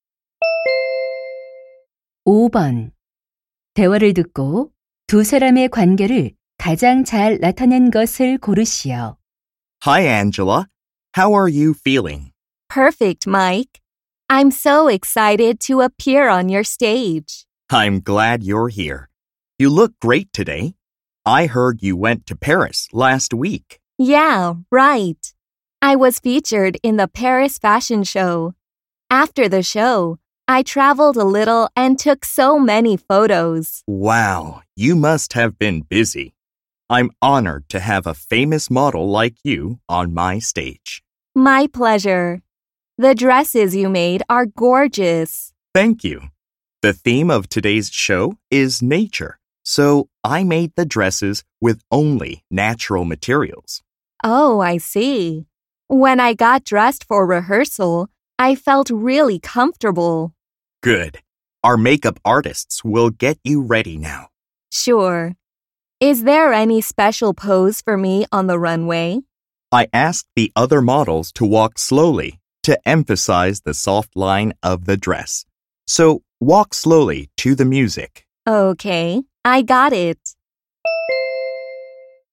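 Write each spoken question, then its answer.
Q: 대화를 듣고 두 사람의 관계를 가장 잘 나타낸 것을 고르시오.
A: 패션 디자이너 — 모델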